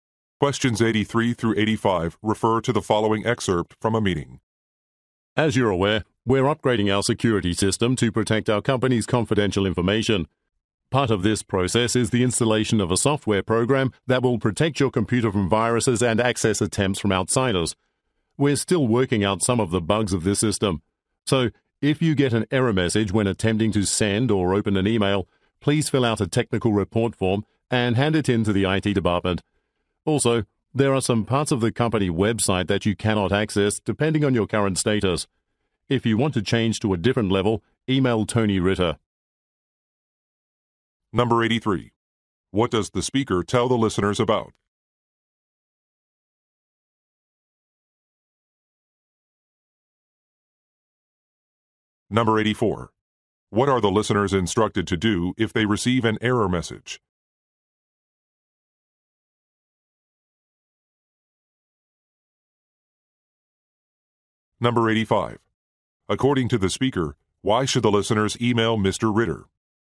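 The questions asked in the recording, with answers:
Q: What does the speaker tell the listeners about?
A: A security system upgrade

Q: What are the listeners instructed to do if they receive an error message?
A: Fill out a technical report form and hand it in to the IT department

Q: According to the speaker, why should the listeners email Mr.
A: To change their website access level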